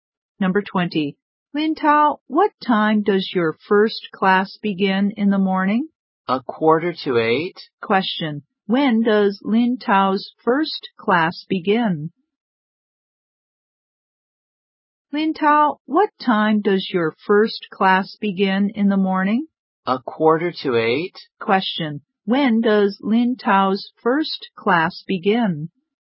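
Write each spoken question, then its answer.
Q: Question. When does Lin Tao's first class begin?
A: At 7:45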